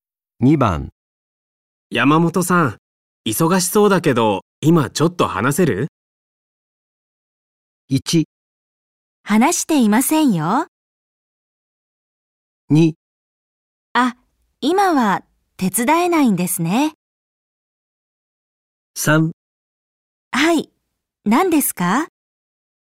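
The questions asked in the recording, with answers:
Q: 山本さん、忙しそうだけど、今ちょっと話せる?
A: 3: はい、何ですか?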